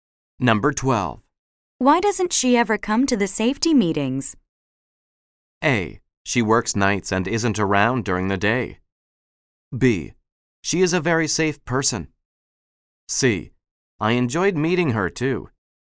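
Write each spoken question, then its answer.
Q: Why doesn't she ever come to the safety meetings?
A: A: She works nights and isn't around during the day.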